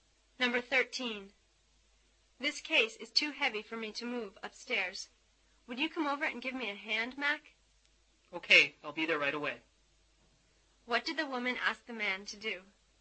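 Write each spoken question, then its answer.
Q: What did the woman ask the man to do?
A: Help her move the case upstairs.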